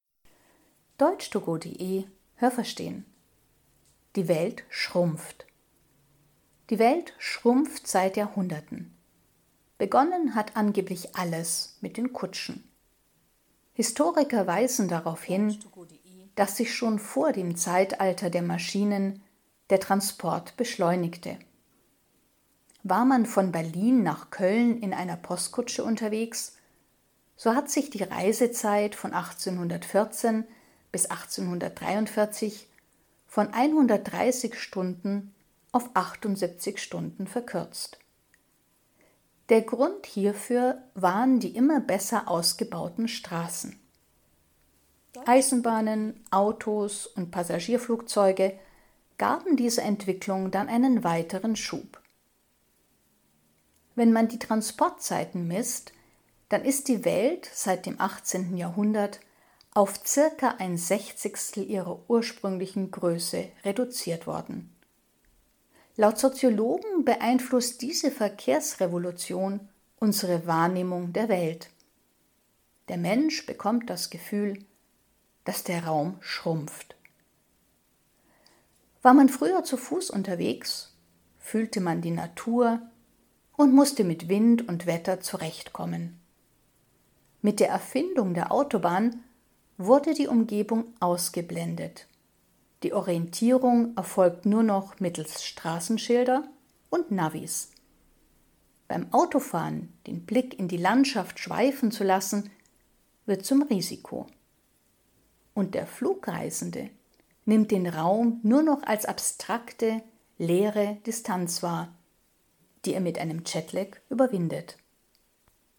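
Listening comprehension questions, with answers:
Haben Sie das gehört? Stimmt diese Aussage?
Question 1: Schon bevor man Maschinen einsetzte, beschleunigte sich der Transport.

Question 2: Fuhr man mit der Kutsche von Berlin nach Köln, dann dauerte das 1814 noch 130 Stunden.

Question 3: 1843 dauerte die Fahrt von Berlin nach Köln nur noch 78 Stunden, weil man die Eisenbahn nehmen konnte.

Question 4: Vergleicht man die Transportzeiten, dann ist die Welt seit dem 18. Jahrhundert um ein Sechzigstel ihrer ursprünglichen Größe reduziert worden.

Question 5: Diese Verkehrsrevolution gibt den Menschen das Gefühl, dass die Welt kleiner wird.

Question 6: Egal ob der Mensch zu Fuß geht oder auf der Autobahn fährt, er ist weiterhin Teil der Natur.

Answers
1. Ja, das habe ich gehört.
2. Ja, das habe ich gehört.
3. Nein, das habe ich nicht gehört.
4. Nein, das habe ich nicht gehört.
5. Ja, das habe ich gehört.
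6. Nein, das habe ich nicht gehört.

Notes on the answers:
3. Die Straßen waren besser, deshalb verkürzte sich die Fahrt mit der Kutsche.
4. Sie wurde nicht um ein Sechzigstel reduziert, sondern auf ein Sechzigstel.

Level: C2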